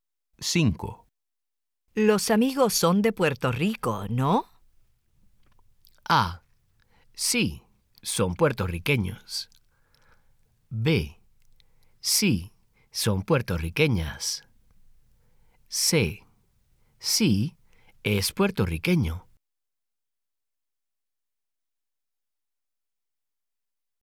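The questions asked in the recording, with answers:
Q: Los amigos son de Puerto Rico, ¿no?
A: A: Sí, son puertorriqueños.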